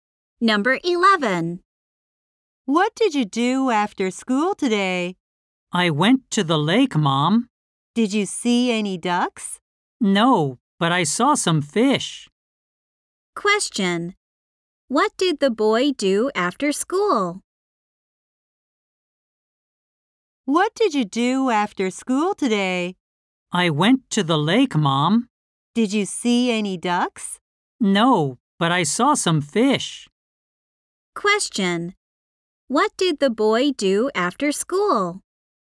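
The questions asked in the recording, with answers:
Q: What did the boy do after school?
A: He went to the lake.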